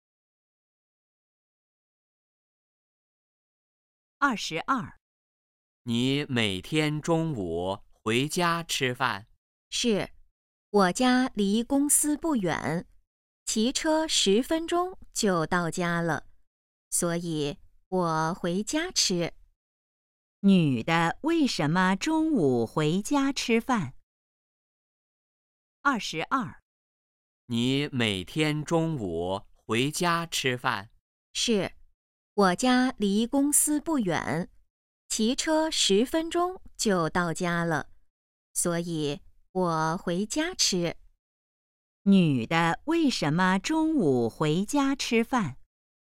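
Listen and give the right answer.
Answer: 家离公司不远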